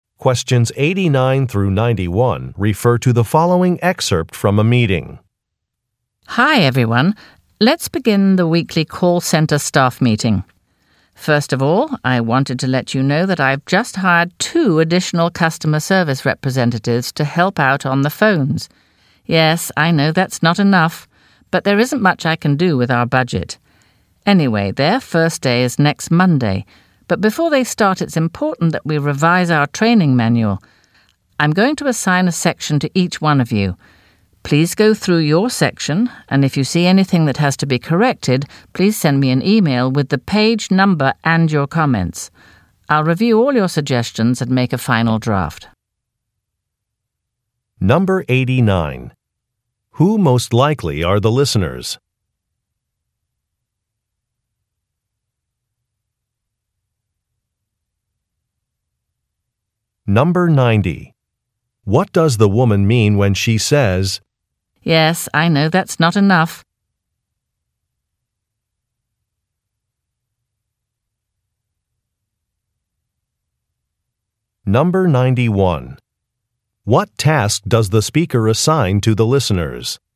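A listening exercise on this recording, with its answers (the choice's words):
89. Who most likely are the listeners?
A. Customer service representatives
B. Software developers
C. Corporate attorneys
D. Financial advisers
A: Customer service representatives

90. What does the woman mean when she says, "Yes, I know that's not enough"?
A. She acknowledges her own mistakes.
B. She is worried about a deadline.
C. She wants the listeners to volunteer.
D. She recognizes the listeners' concerns.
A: She recognizes the listeners' concerns.

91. What task does the speaker assign to the listeners?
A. Updating a mailing list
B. Revising training materials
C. Mentoring new staff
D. Learning to use a software program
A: Revising training materials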